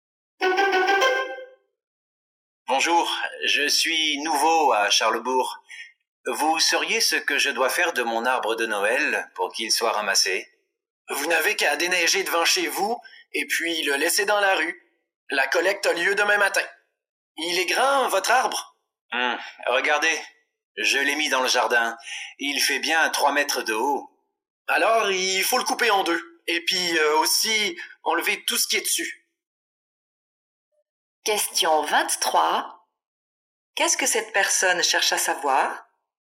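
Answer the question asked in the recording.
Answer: Comment faire ramasser son sapin de Noël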